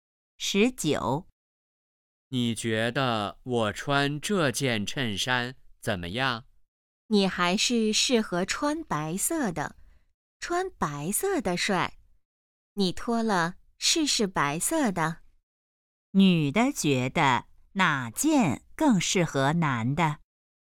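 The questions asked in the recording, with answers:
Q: 女的觉得哪件更适合男的?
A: 白色的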